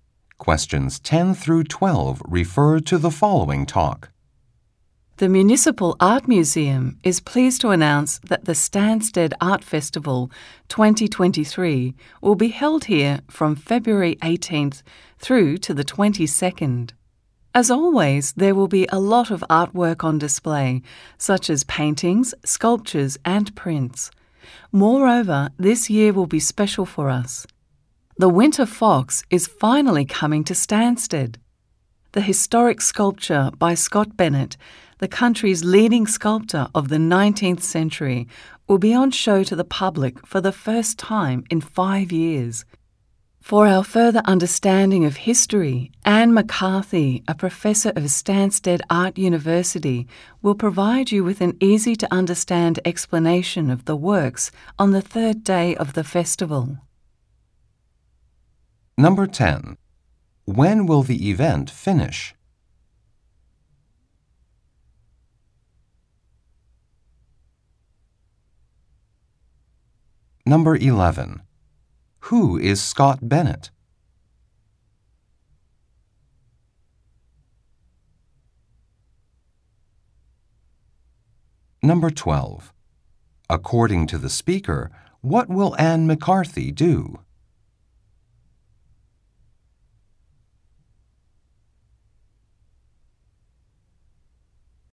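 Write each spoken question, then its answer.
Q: When will the event finish?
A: On February 22nd

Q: Who is Scott Bennett?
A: The country's leading 19th-century sculptor

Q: According to the speaker, what will Anne McCarthy do?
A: Explain the works on the third day of the festival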